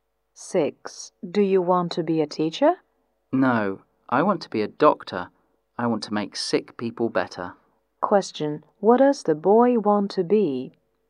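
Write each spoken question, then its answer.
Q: What does the boy want to be?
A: A doctor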